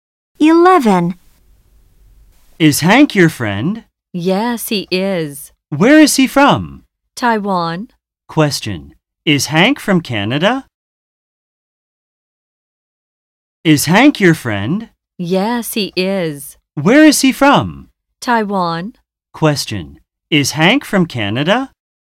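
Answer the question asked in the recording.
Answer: No, he isn't. He's from Taiwan.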